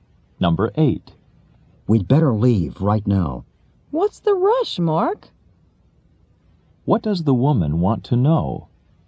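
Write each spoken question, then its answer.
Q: What does the woman want to know?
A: Why they have to leave in a hurry.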